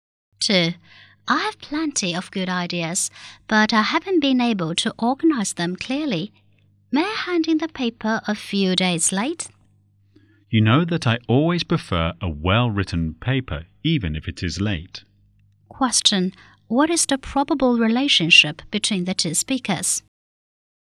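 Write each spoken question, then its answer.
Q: What is the probable relationship between the two speakers?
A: Student and teacher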